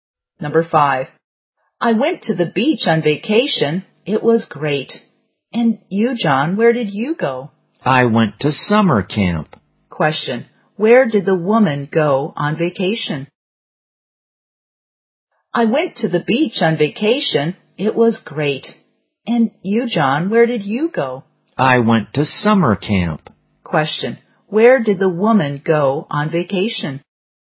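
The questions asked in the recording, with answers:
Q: Question, where did the woman go on vacation?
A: To the beach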